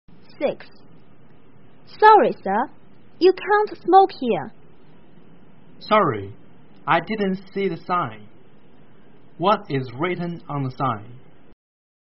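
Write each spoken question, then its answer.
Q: What is written on the sign?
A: No smoking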